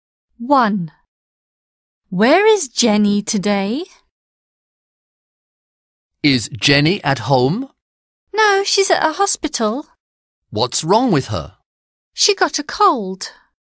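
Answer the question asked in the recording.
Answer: At a hospital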